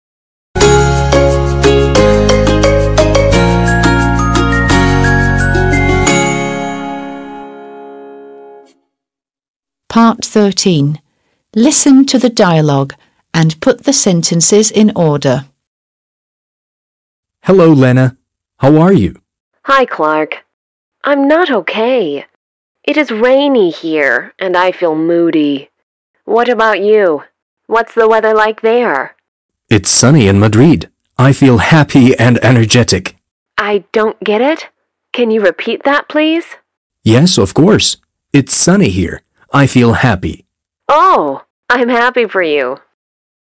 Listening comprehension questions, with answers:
13. Listen to the dialogue and put the sentences in order.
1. Clark: Hello, Lena! How are you?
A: 1

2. Lena: Hi, Clark! I'm not OK. It is rainy here, and I feel moody. What about you? What's the weather like there?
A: 2

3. Clark: It's sunny in Madrid. I feel happy and energetic.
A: 3

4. Lena: I don't get it. Can you repeat that, please?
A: 4

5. Clark: Yes, of course. It's sunny here. I feel happy.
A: 5

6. Lena: Oh, I'm happy for you.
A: 6

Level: 6. Sınıf